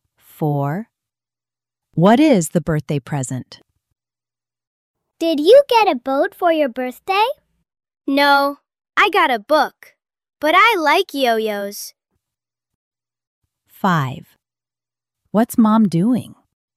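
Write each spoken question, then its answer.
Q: What is the birthday present?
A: A book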